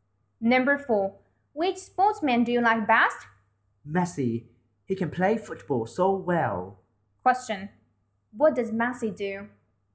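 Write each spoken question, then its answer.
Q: What does Messi do?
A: He plays football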